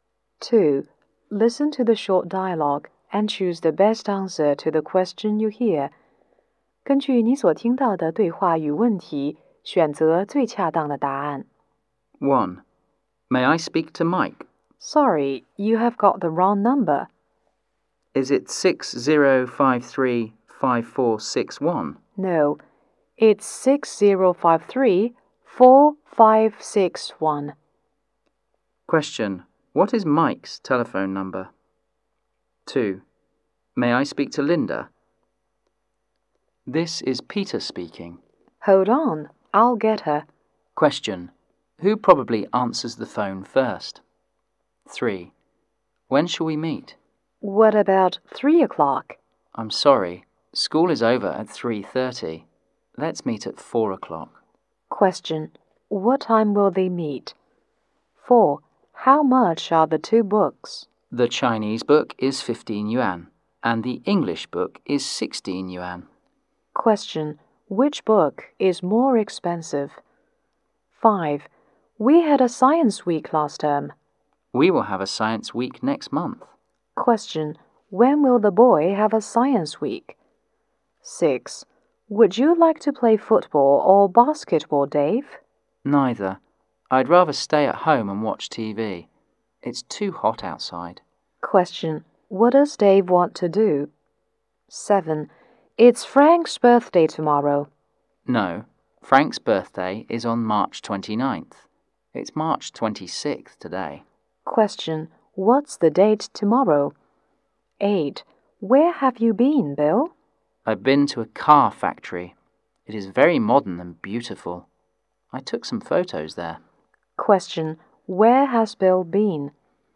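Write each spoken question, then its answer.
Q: Question, what is Mike's telephone number?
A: 6053-4561

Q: Question, what time will they meet?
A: At 4 o'clock

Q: Question, which book is more expensive?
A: The English book

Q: Question, when will the boy have a science week?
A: Next month

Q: Question, what does Dave want to do?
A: Stay at home and watch TV

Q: Question, what's the date tomorrow?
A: March 27th

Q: Question, where has Bill been?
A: To a car factory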